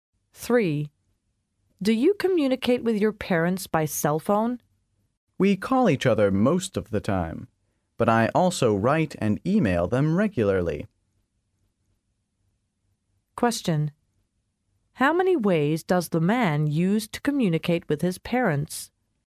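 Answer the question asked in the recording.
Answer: Three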